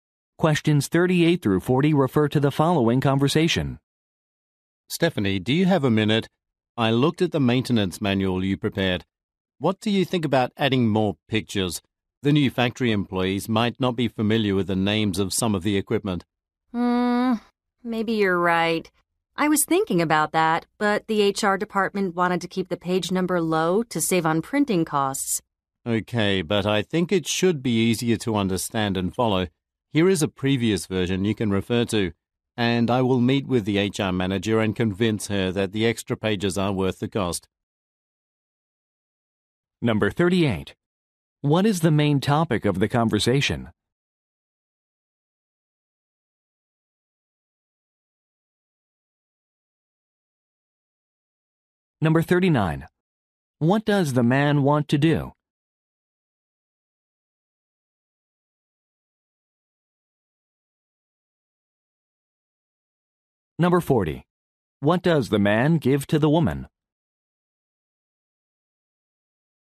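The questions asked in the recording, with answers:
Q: What is the main topic of the conversation?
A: A maintenance manual

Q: What does the man want to do?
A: Add more pictures to the manual

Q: What does the man give to the woman?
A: A previous version of the manual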